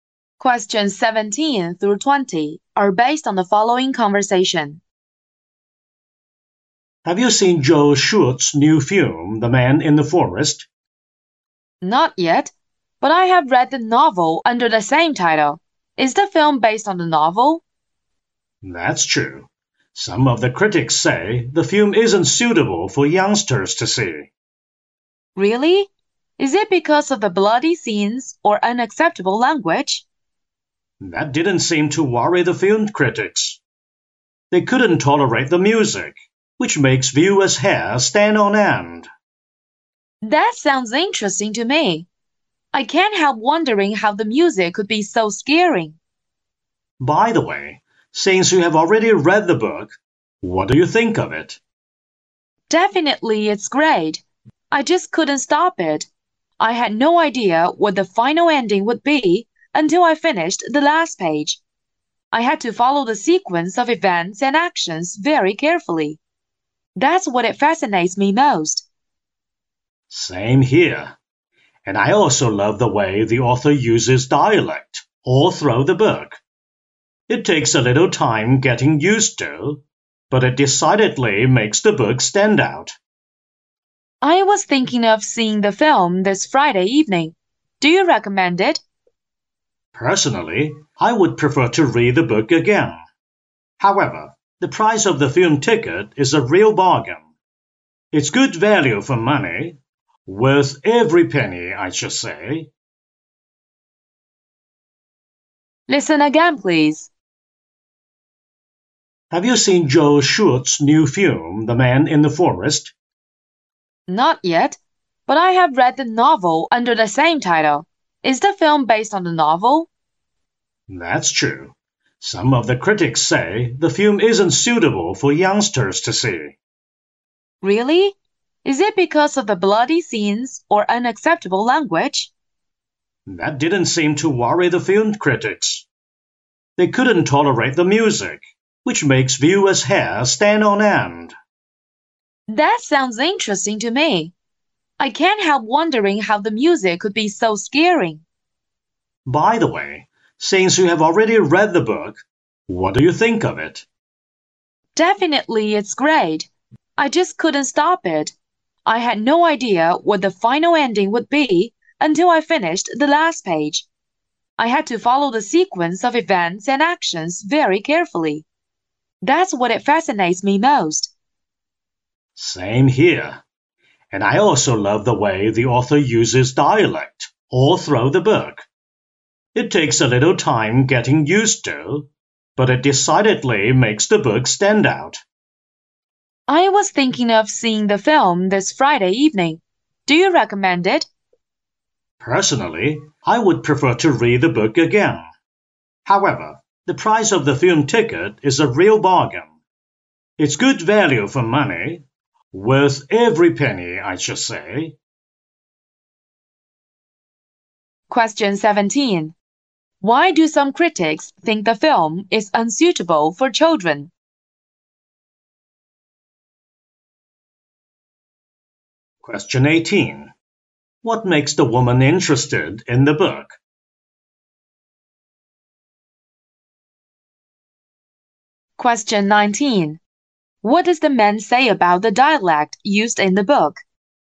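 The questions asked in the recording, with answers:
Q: Why do some critics think the film is unsuitable for children?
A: Its music is too scary.

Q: What does the man say about the dialect used in the book?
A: It takes time to get used to but makes the book stand out.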